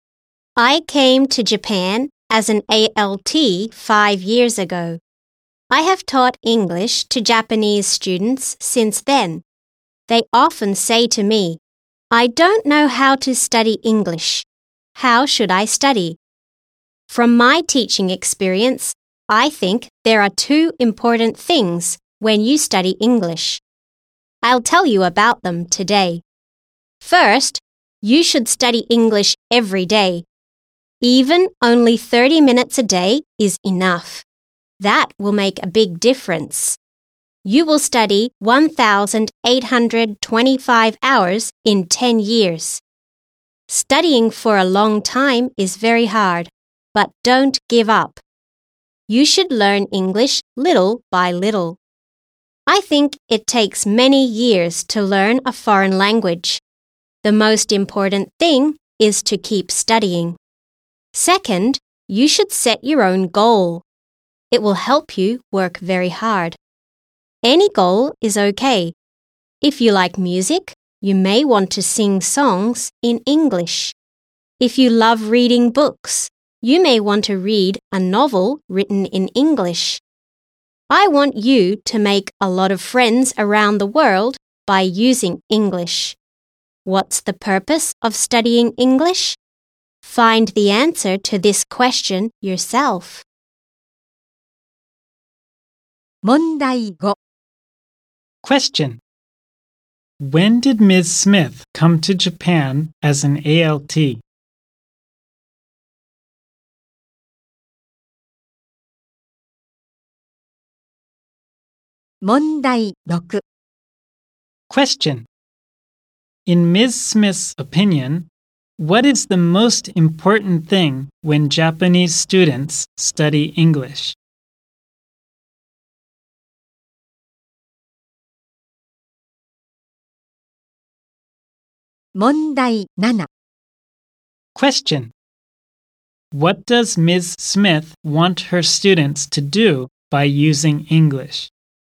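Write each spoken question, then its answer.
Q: When did Ms. Smith come to Japan as an ALT?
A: 5 years ago.

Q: In Ms. Smith's opinion,What is the most important thing when Japanese students study English?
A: To keep studying.

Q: What does Ms. Smith want her students to do by using English?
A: To make a lot of friends around the world.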